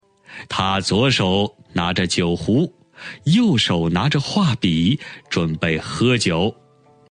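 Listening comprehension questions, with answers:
★音声を聞き、空欄〇に当てはまる単語を探して、授業内課題用紙に漢字とピンインを書いてください。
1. 他左手拿着酒壶,右手拿着画笔,〇〇喝酒。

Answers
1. 准备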